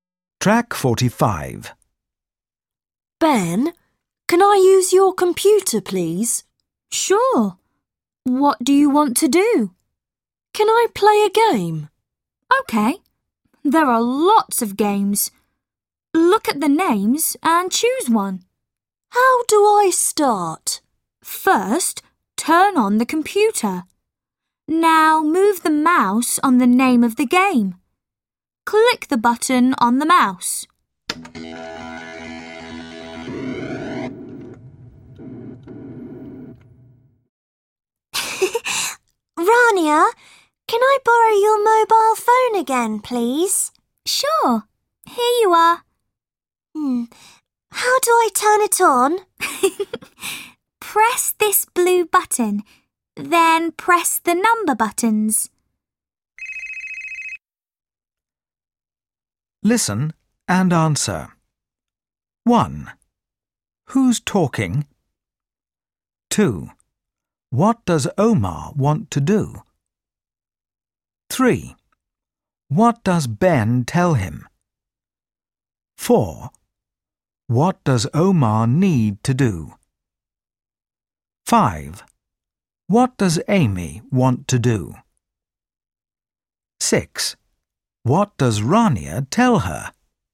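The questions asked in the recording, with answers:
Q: What does Omar want to do?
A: Play a computer game

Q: What does Ben tell him?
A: Turn on the computer, move the mouse onto the game's name and click the button

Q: What does Amy want to do?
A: Borrow Rania's mobile phone

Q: What does Rania tell her?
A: Press the blue button, then press the number buttons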